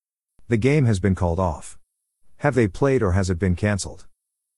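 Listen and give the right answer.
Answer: canceled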